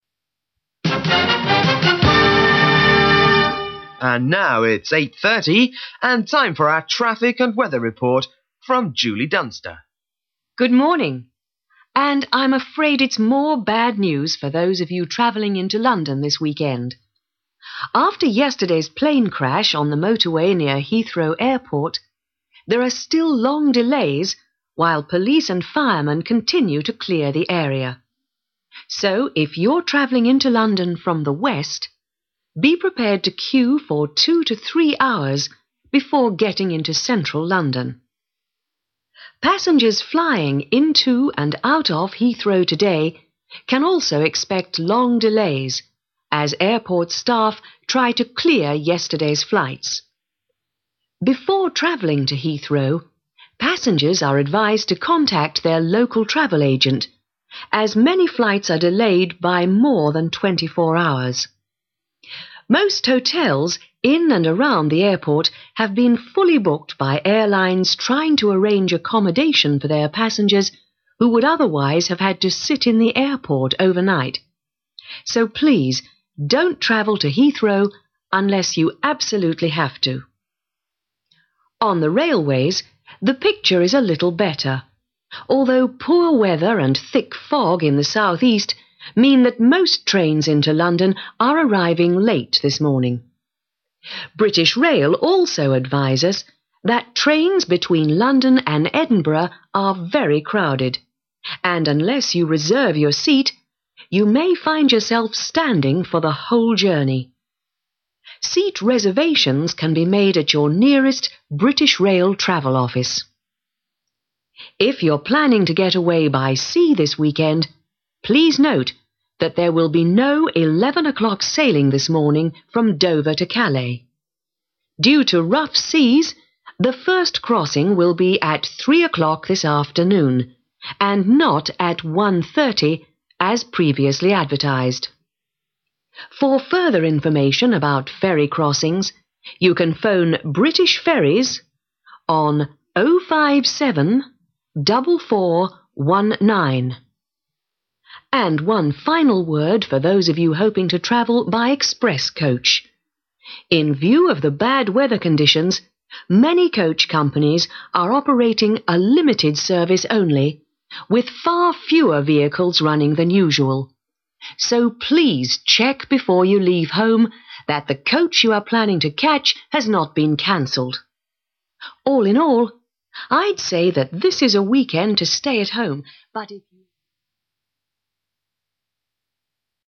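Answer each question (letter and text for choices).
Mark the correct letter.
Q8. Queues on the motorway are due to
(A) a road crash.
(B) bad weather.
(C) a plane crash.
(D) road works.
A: (C) a plane crash.

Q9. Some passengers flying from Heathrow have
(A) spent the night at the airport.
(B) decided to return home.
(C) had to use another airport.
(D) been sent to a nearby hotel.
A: (D) been sent to a nearby hotel.

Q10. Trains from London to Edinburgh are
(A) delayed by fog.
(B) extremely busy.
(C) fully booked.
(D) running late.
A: (B) extremely busy.

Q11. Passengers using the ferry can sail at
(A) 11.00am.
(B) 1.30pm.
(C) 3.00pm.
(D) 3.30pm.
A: (C) 3.00pm.

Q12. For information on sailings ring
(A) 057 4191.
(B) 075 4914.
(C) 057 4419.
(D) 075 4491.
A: (C) 057 4419.

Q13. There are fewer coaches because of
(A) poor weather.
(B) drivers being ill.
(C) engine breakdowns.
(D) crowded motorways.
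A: (A) poor weather.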